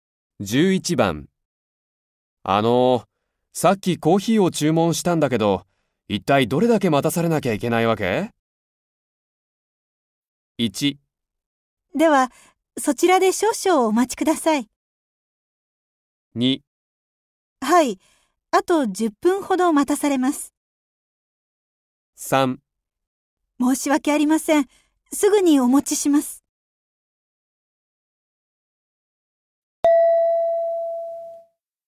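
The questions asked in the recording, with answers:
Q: さっきコーヒーを注文したんだけど、一体どれだけ待たされなきゃいけないわけ?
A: 3: 申し訳ありません。すぐにお持ちします。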